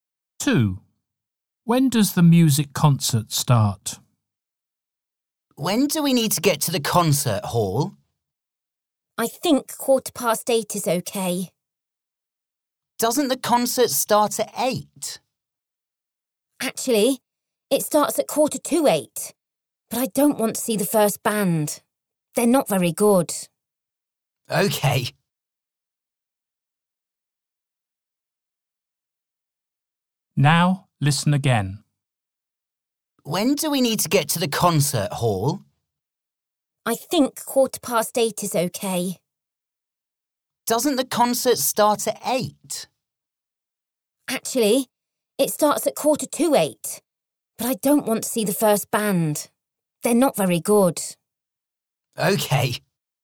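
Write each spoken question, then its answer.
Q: When does the music concert start?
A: 7:45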